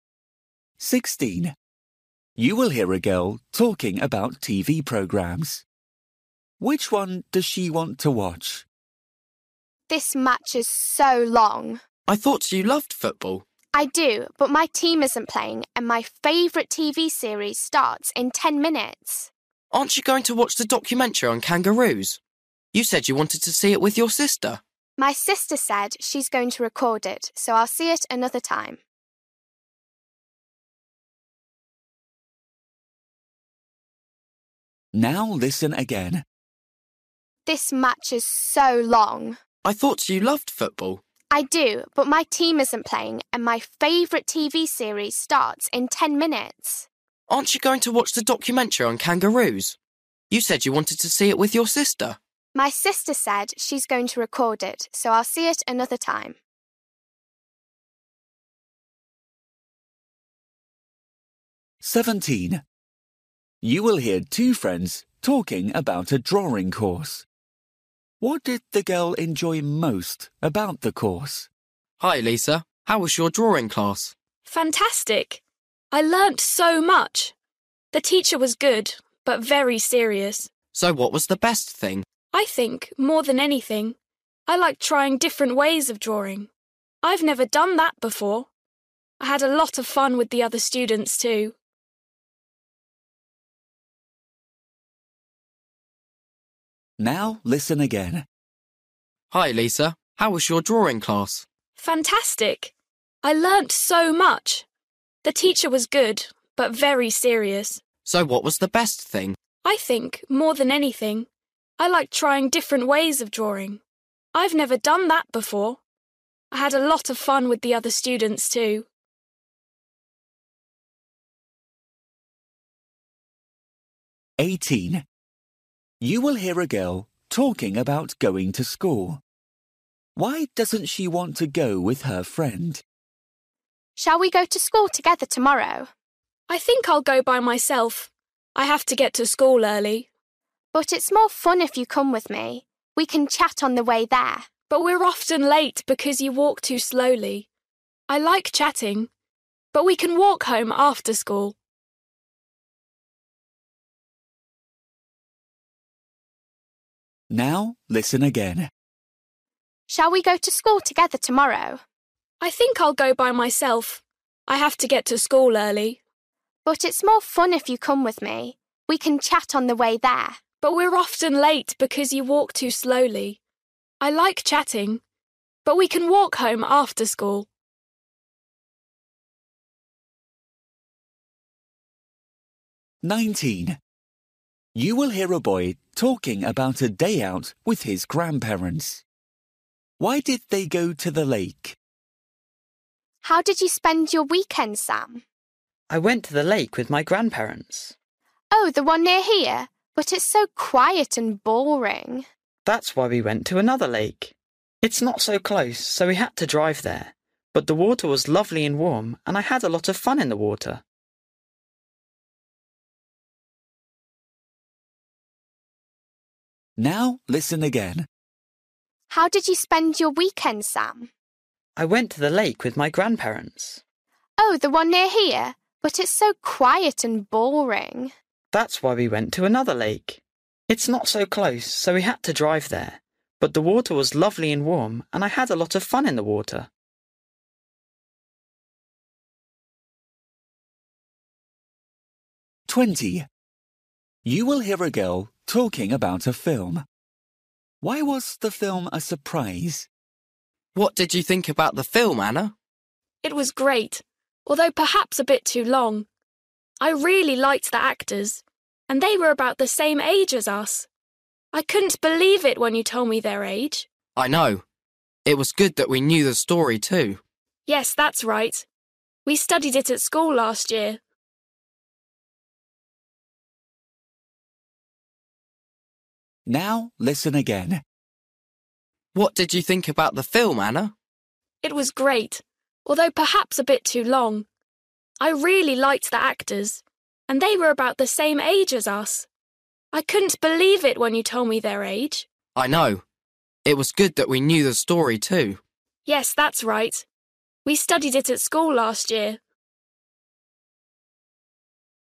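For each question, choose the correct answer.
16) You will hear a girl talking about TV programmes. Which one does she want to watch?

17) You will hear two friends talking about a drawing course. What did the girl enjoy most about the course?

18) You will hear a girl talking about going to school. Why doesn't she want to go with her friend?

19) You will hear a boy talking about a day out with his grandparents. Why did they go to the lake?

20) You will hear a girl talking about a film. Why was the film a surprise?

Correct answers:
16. her favourite TV series
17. trying different ways of drawing
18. her friend walks too slowly and they are often late
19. to have fun in the lovely warm water
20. the actors were about the same age as them

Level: Luyện nghe trình độ A2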